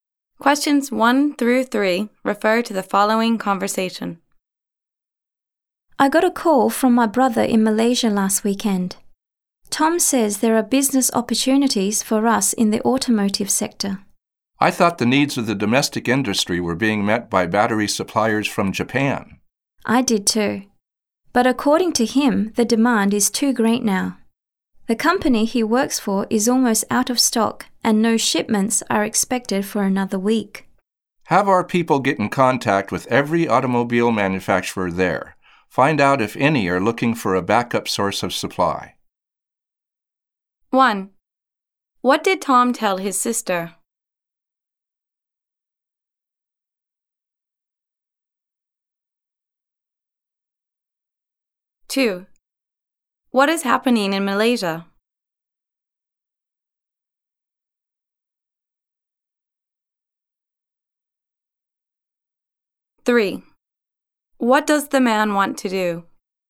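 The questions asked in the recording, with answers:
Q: What did Tom tell his sister?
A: There are business opportunities for them in the automotive sector.

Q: What is happening in Malaysia?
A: Demand for batteries is too great; suppliers are almost out of stock.

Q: What does the man want to do?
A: Contact every automobile manufacturer there to see if any want a backup supplier.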